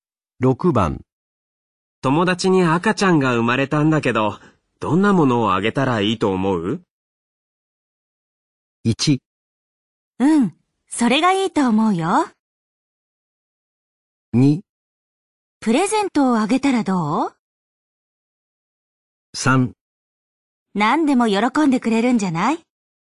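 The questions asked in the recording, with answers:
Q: 友達に赤ちゃんが生まれたんだけど、どんなものをあげたらいいと思う?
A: 3: 何でも喜んでくれるんじゃない?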